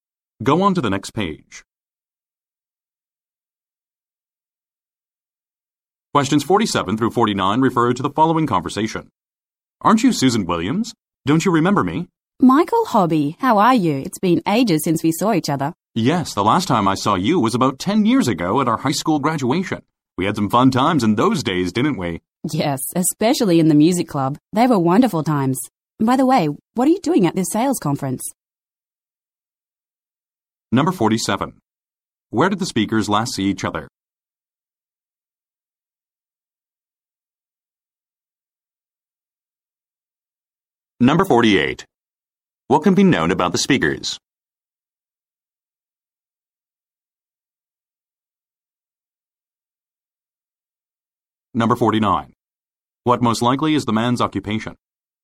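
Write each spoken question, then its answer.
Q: Where did the speakers last see each other?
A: At their high school graduation

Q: What can be known about the speakers?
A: They went to the same high school and were in the music club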